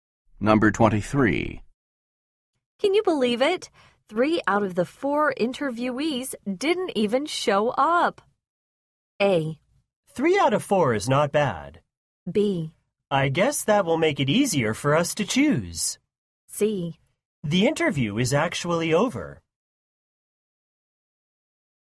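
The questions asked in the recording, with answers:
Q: Can you believe it? 3 out of the 4 interviewees didn't even show up.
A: B: I guess that will make it easier for us to choose.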